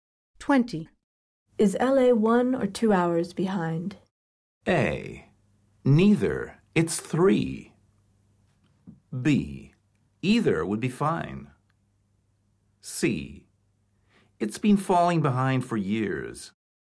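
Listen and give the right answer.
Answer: A: Neither. It's 3.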